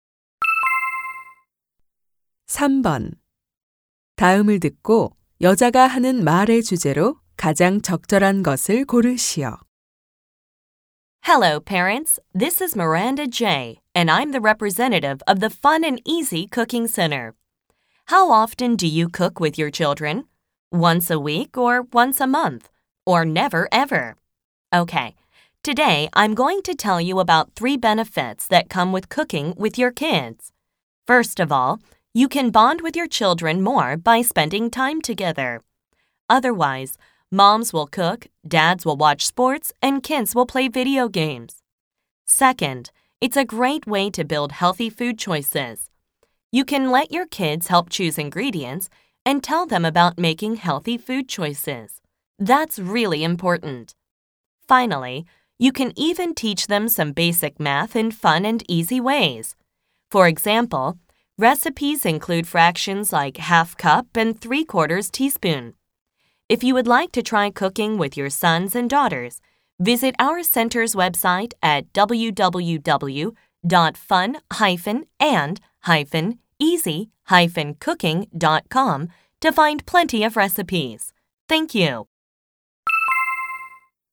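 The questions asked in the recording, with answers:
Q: 다음을 듣고 여자가 하는 말의 주제로 가장 적절한 것을 고르시오.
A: 아이들과 함께 요리하는 것의 이점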